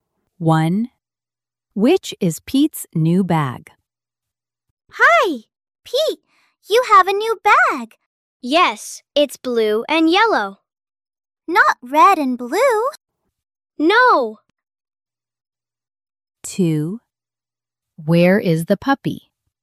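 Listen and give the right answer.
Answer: The blue and yellow one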